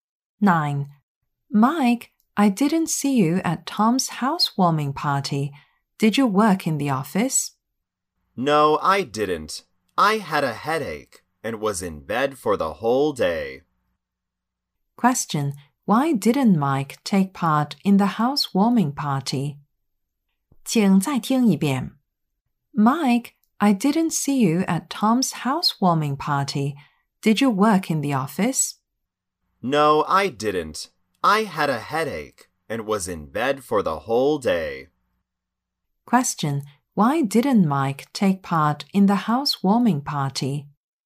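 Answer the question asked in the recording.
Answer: He had a headache and stayed in bed all day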